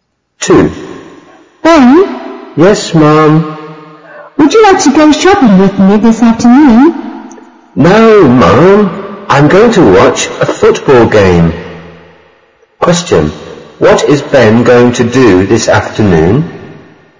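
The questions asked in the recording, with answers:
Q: What is Ben going to do this afternoon?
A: Watch a football game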